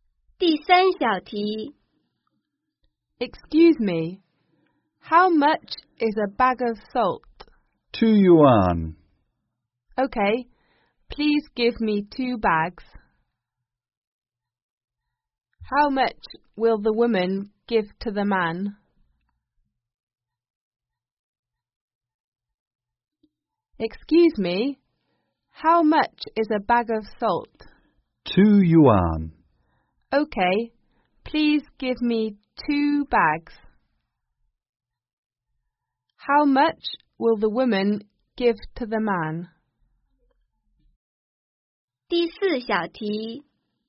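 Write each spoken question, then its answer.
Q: How much will the woman give to the man?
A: 4 yuan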